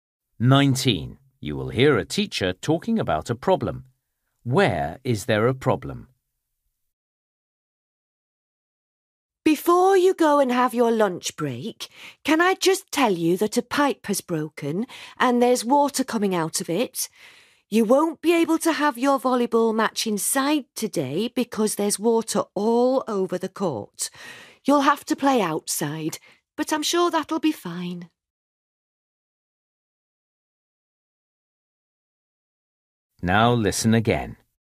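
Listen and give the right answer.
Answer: The indoor volleyball court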